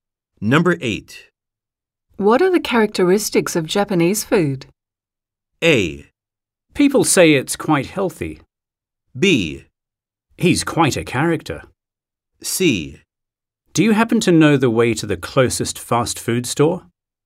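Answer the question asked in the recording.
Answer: A: People say it's quite healthy.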